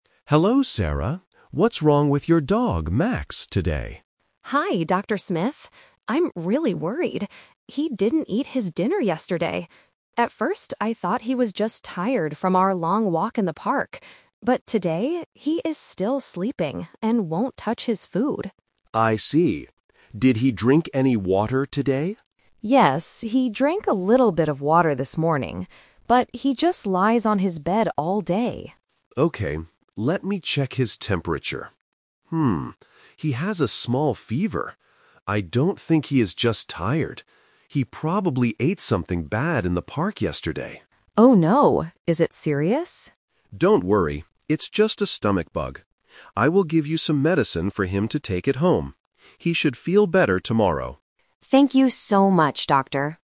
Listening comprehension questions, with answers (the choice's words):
Listen to a conversation between a pet owner and a veterinarian (vet). Choose the correct answer (A, B, or C) for each question.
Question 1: Why did Sarah originally think Max was sleeping so much?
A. She thought he had a terrible fever.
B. She thought he ate something bad.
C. She thought he was tired from a walk.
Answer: She thought he was tired from a walk.

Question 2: What did the dog do this morning?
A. He ate a big bowl of food.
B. He drank a little bit of water.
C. He went for a long walk.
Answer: He drank a little bit of water.

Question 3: What will happen next?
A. Sarah will take Max and some medicine home.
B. Max will stay at the animal clinic for a few days.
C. The doctor will give Max some special food.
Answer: Sarah will take Max and some medicine home.

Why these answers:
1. Sarah says, "At first, I thought he was just tired from our long walk in the park." This was her original guess. The Trap: Option B is the A2 "Twist" trap. The doctor says, "He probably ate something bad," but that is the doctor's diagnosis, not what Sarah originally thought. Option A is also a trap; the doctor finds a fever, but Sarah didn't know that at first.
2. Sarah explicitly states, "Yes, he drank a little bit of water this morning." The Trap: Option A is the exact opposite of the truth (Sarah says he "won't touch his food"). Option C is a trap because they went for a walk yesterday, not this morning.
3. The vet says, "I will give you some medicine for him to take at home." This means Sarah will take him home with the medicine. The Trap: Option B is a plausible thing that happens at a vet clinic, but the doctor says he can take the medicine "at home." Option C is not mentioned; only medicine is given, not special food.

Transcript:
Vet: Hello, Sarah. What's wrong with your dog, Max, today?
Owner: Hi, Dr. Smith. I'm really worried. He didn't eat his dinner yesterday. At first, I thought he was just tired from our long walk in the park. But today, he is still sleeping and won't touch his food.
Vet: I see. Did he drink any water today?
Owner: Yes, he drank a little bit of water this morning. But he just lies on his bed all day.
Vet: Okay, let me check his temperature. Hmm, he has a small fever. I don't think he is just tired. He probably ate something bad in the park yesterday.
Owner: Oh no! Is it serious?
Vet: Don't worry. It's just a stomach bug. I will give you some medicine for him to take at home. He should feel better tomorrow.